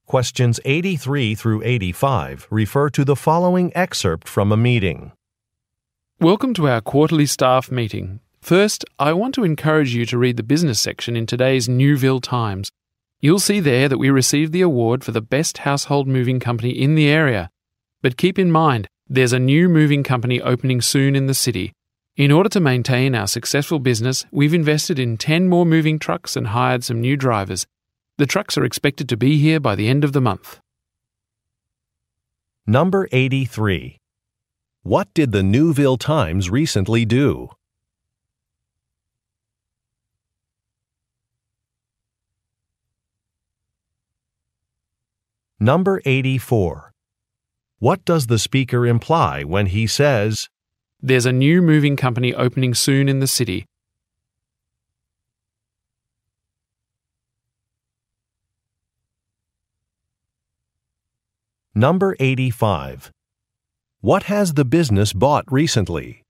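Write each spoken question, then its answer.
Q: What did the Newville Times recently do?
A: It reported that the company won the award for best household moving company in the area

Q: What has the business bought recently?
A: 10 more moving trucks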